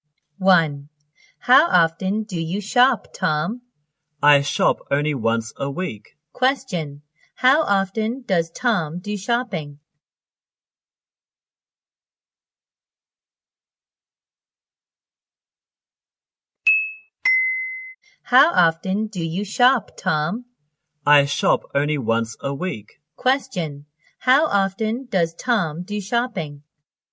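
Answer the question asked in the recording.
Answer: Once a week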